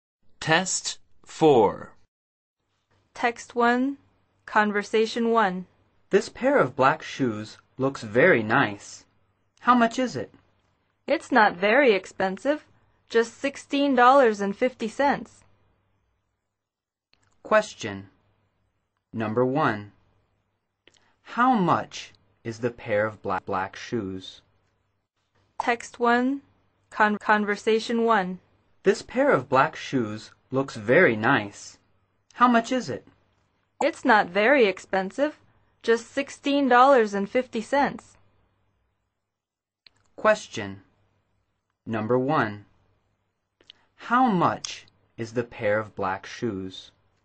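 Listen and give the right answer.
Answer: $16.50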